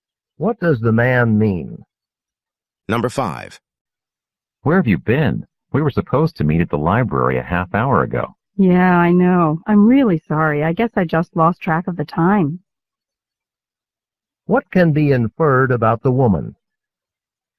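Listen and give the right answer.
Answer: She forgot the time and arrived late for their meeting.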